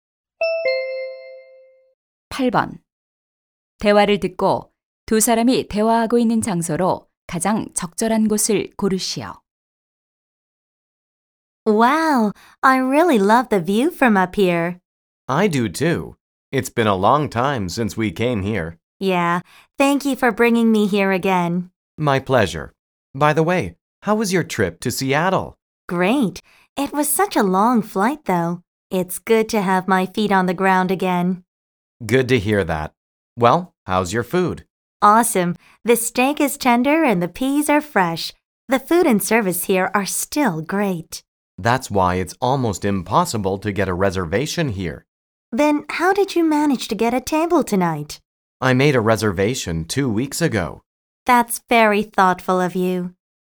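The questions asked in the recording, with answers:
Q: 대화를 듣고 두 사람이 대화하고 있는 장소로 가장 적절한 곳을 고르시오.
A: 레스토랑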